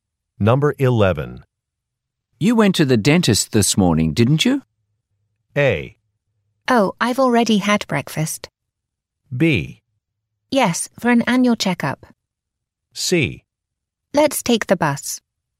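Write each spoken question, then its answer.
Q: You went to the dentist this morning, didn't you?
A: B: Yes, for an annual checkup.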